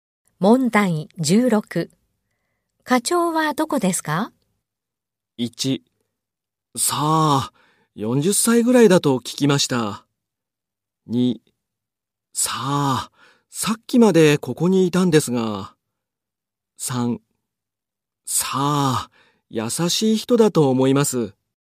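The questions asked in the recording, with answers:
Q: 課長はどこですか?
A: 2: さあ、さっきまでここにいたんですが。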